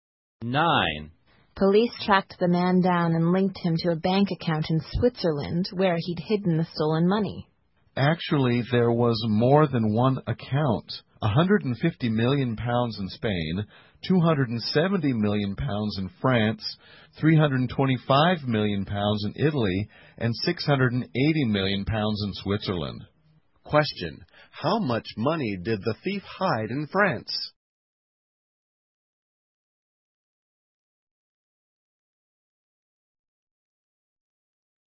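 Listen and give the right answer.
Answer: 270 million pounds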